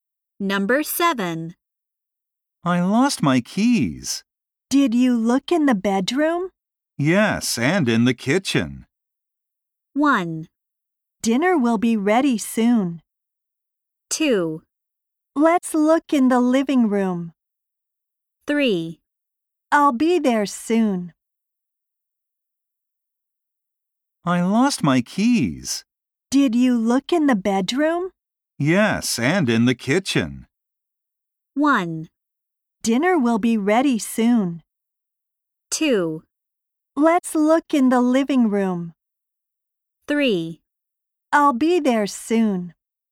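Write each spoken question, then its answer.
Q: Yes, and in the kitchen.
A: 2: Let's look in the living room.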